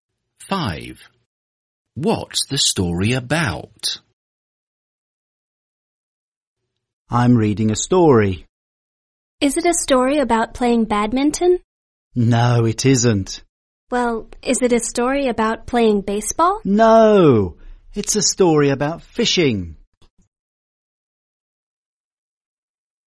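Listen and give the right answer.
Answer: fishing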